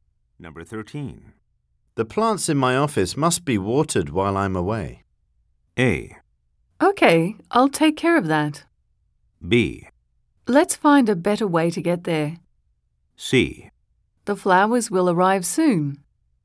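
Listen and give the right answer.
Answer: A: Okay, I'll take care of that.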